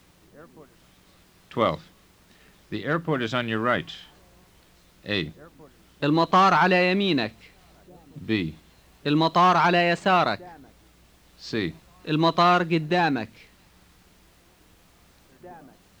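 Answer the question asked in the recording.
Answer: A: المطار على يمينك.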